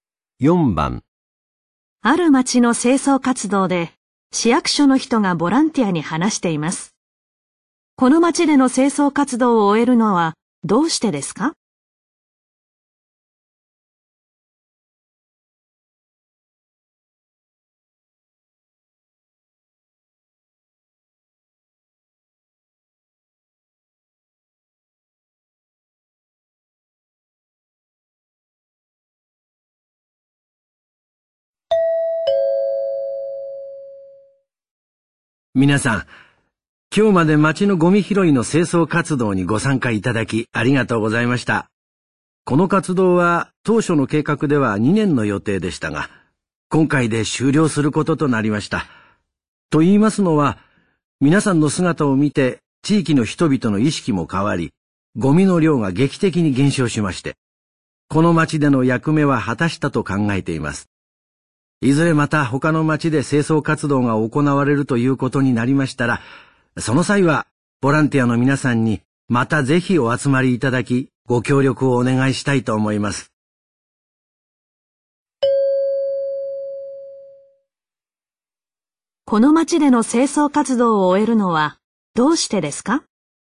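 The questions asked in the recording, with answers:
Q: この町での清掃活動を終えるのはどうしてですか?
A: ゴミの量が劇的に減ったから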